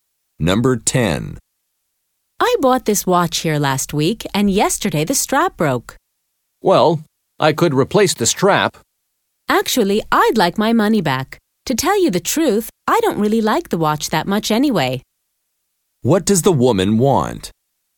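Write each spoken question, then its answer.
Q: What does the woman want?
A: Her money back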